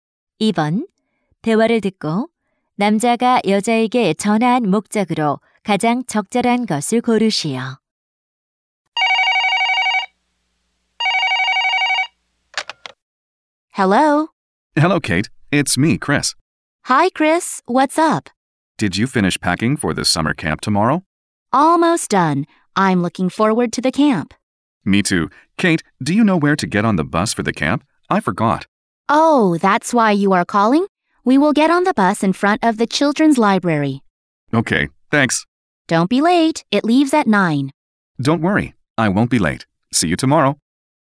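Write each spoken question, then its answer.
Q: 2번 대화를 듣고 남자가 여자에게 전화한 목적으로 가장 적절한 것을 고르시오.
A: 캠프 버스 타는 장소를 물어보려고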